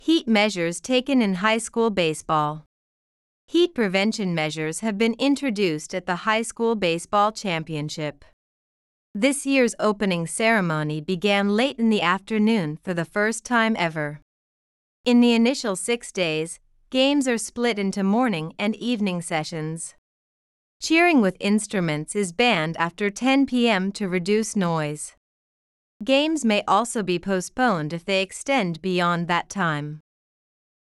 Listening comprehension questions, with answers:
次の各質問の答えを探しながら聞きましょう。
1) What time of day did this year's opening ceremony begin?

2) What is banned after 10 p.m?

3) What may happen if games extend beyond 10 p.m?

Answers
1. It began late in the afternoon for the first time ever.
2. Cheering with instruments is banned to reduce noise.
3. They may be postponed.

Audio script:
Heat Measures Taken in High School Baseball
Heat-prevention measures have been introduced at the High School Baseball Championship.
This year's opening ceremony began late in the afternoon for the first time ever.
In the initial six days, games are split into morning and evening sessions.
Cheering with instruments is banned after 10 p.m. to reduce noise.
Games may also be postponed if they extend beyond that time.